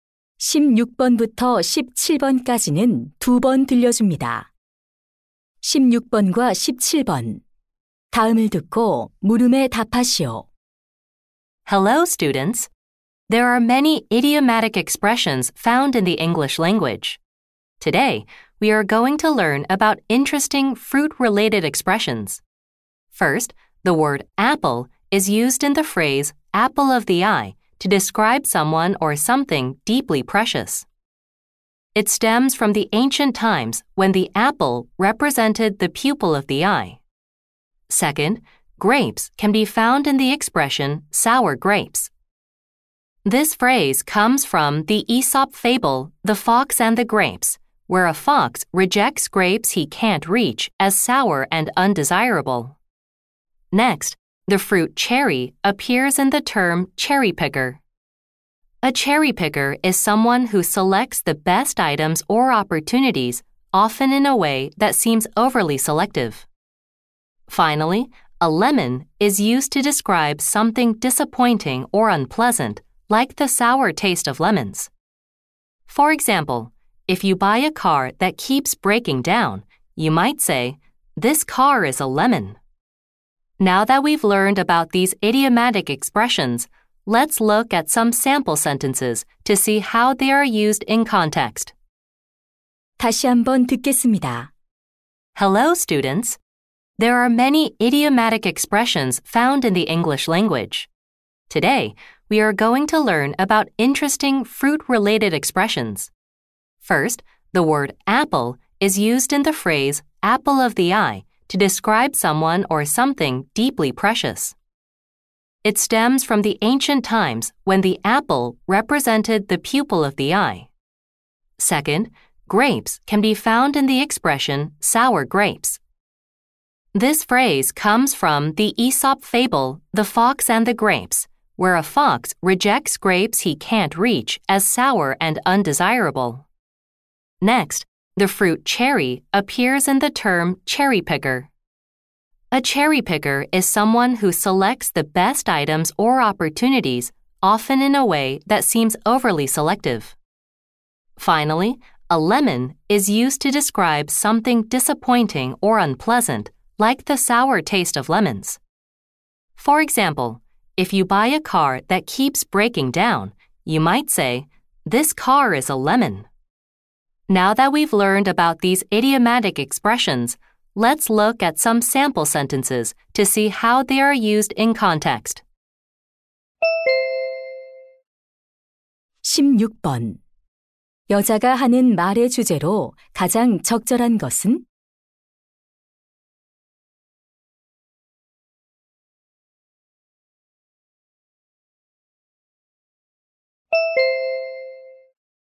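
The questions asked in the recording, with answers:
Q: 여자가 하는 말의 주제로 가장 적절한 것은?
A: 과일과 관련된 영어 관용 표현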